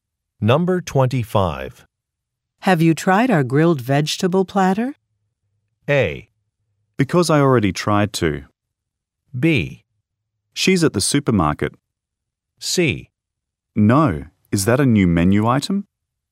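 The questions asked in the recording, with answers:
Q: Have you tried our grilled vegetable platter?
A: C: No, is that a new menu item?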